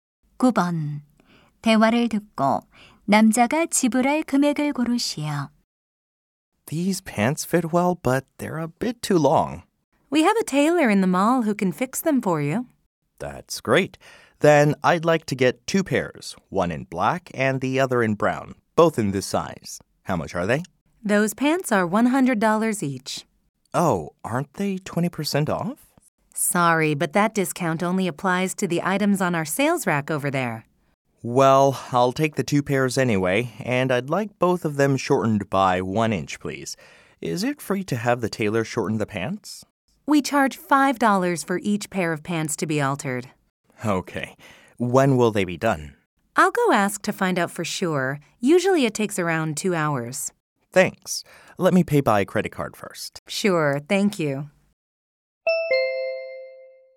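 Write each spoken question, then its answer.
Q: 대화를 듣고 남자가 지불할 금액을 고르시오.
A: $210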